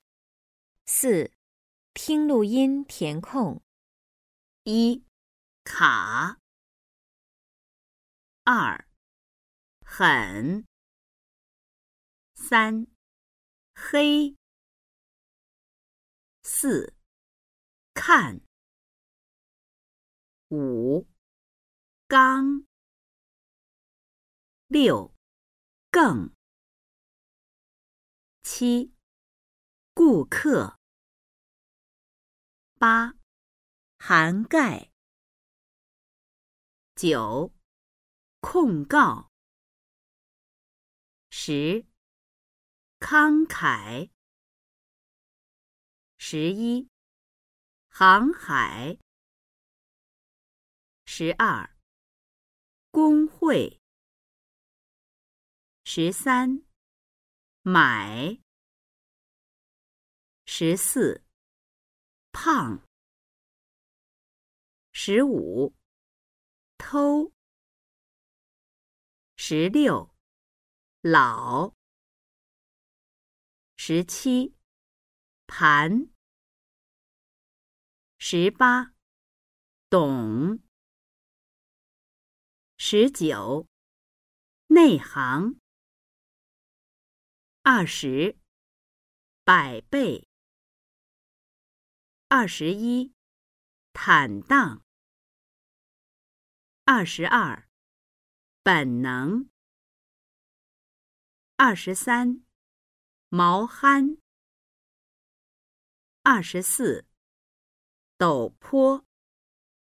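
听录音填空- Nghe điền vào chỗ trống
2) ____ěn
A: h

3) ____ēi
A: h

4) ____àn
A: k

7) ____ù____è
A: g, k

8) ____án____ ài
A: h, g

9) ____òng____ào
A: k, g

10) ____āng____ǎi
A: k, k

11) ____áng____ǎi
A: h, h

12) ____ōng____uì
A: g, h

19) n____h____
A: èi, áng

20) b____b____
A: ǎi, èi

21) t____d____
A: ǎn, àng

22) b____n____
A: ěn, éng

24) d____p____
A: ǒu, ō

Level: Sơ Cấp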